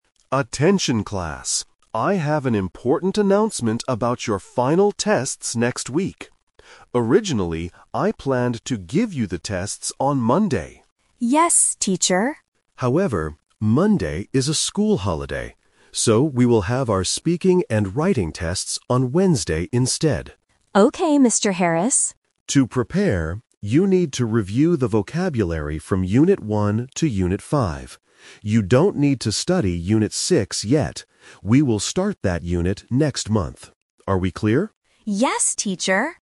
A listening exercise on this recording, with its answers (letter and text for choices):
Listen to the announcement and circle the correct answer (A, B, or C).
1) When will the students take their tests?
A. On Monday.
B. On Wednesday.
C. Next month.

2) Why did the test schedule change?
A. Because there is a school holiday.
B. Because the students are not ready.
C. Because the teacher is busy.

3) What should the students study for the test?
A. Unit 6.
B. All of the units in the book.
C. Unit 1 to Unit 5.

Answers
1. B. On Wednesday.
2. A. Because there is a school holiday.
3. C. Unit 1 to Unit 5.

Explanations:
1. Mr. Harris says, "So, we will have our Speaking and Writing tests on Wednesday instead." Why the trap is wrong: Option (A) is the trap (The Twist). The teacher originally planned to have the test on Monday, but the schedule changed. Option (C) is a trap because "next month" is when they will study Unit 6, not when they will take the test.
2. The teacher explains the reason for the change: "However, Monday is a school holiday." Why the trap is wrong: Options (B) and (C) are plausible guesses for why a test might be delayed, but they are not mentioned in the audio.
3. Mr. Harris gives clear instructions on what to review: "you need to review the vocabulary from Unit 1 to Unit 5." Why the trap is wrong: Option (A) is the trap. The teacher explicitly says, "You don't need to study Unit 6 yet." Option (B) was not mentioned.

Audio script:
I have an important announcement about your final tests next week. Originally, I planned to give you the tests on Monday.
Class: Yes, teacher.
Mr. Harris: However, Monday is a school holiday. So, we will have our Speaking and Writing tests on Wednesday instead.
Class: Okay, Mr. Harris.
Mr. Harris: To prepare, you need to review the vocabulary from Unit 1 to Unit 5. You don't need to study Unit 6 yet.